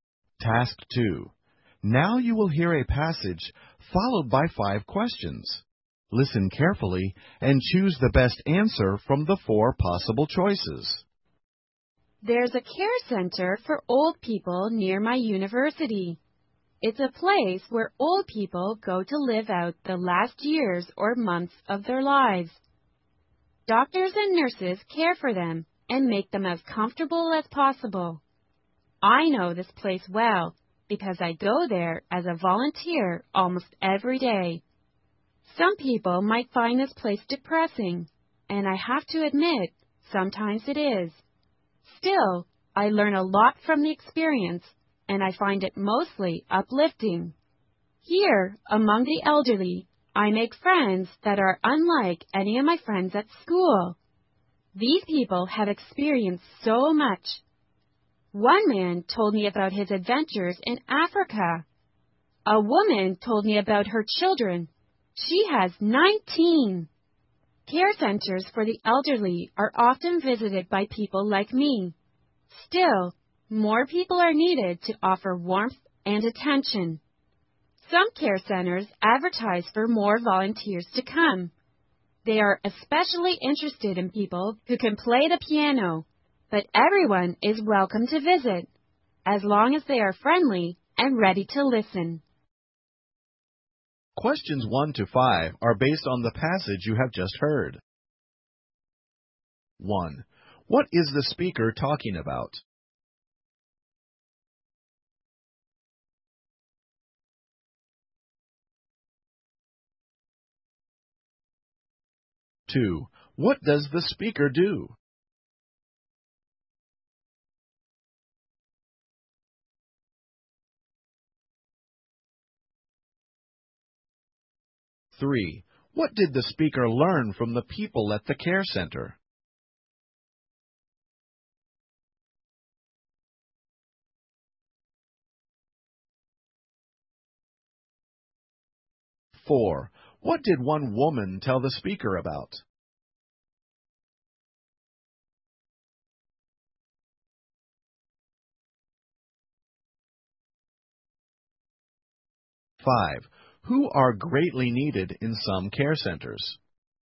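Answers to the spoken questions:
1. Volunteering at a care center for old people.
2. Volunteers at a care center almost every day.
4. Her children.
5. Volunteers who can play the piano.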